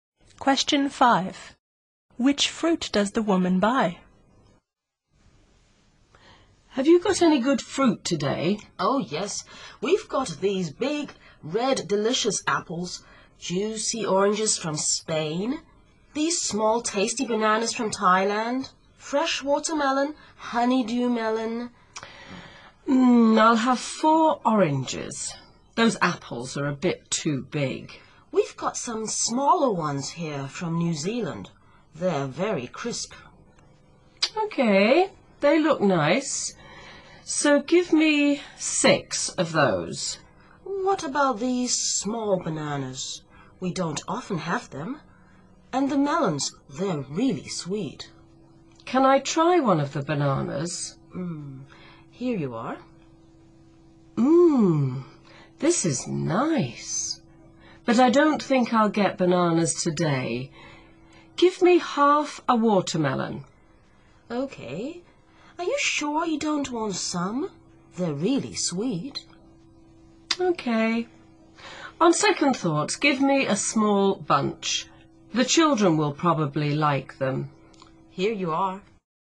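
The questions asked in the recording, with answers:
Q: Which fruit does the woman buy?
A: 4 oranges, 6 small New Zealand apples, half a watermelon and a small bunch of bananas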